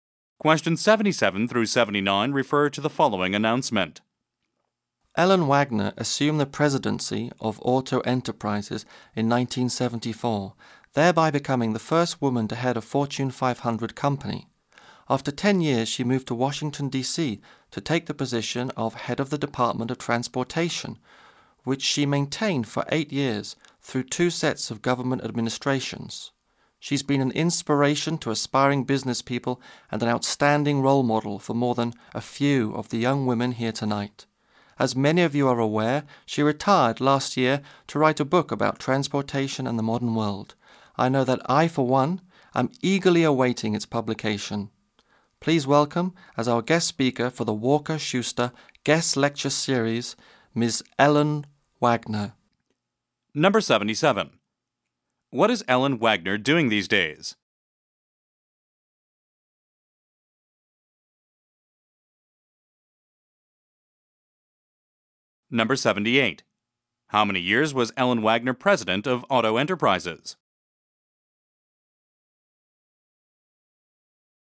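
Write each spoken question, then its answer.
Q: What is Ellen Wagner doing these days?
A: Writing a book about transportation and the modern world

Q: How many years was Ellen Wagner president of Auto Enterprises?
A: 10 years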